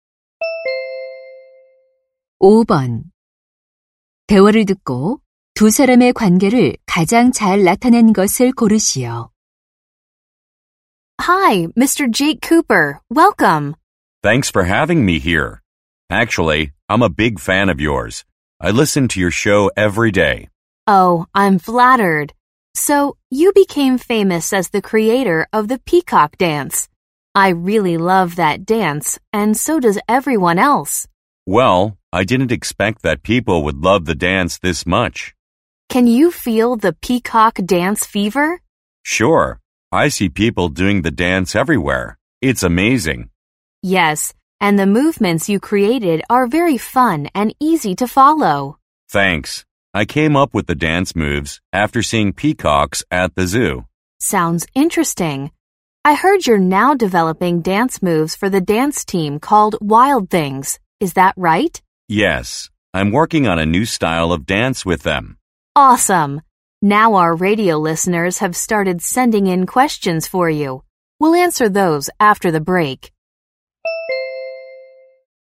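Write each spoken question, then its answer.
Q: 대화를 듣고 두 사람의 관계를 가장 잘 나타낸 것을 고르시오.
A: 라디오 진행자 - 안무가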